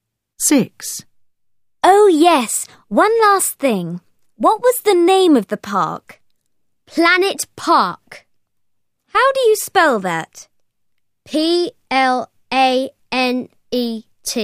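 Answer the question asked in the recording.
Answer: Planet Park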